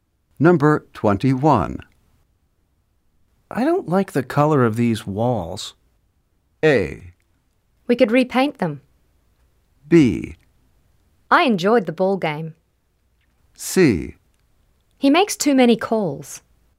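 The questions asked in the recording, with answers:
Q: I don't like the color of these walls.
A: A: We could repaint them.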